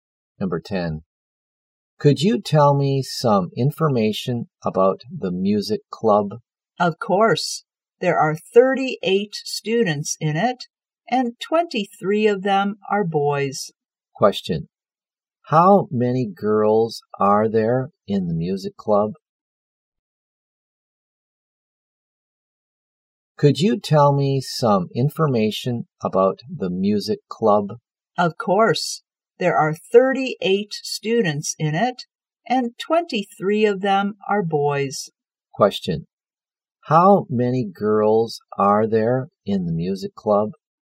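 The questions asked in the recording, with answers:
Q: How many girls are there in the music club?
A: 15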